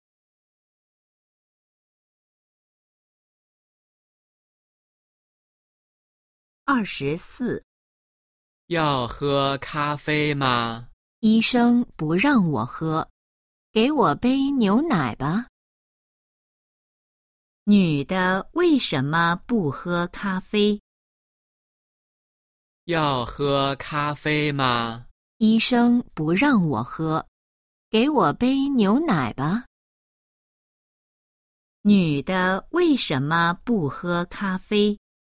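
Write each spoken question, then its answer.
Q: 女的为什么不喝咖啡?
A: 医生不让她喝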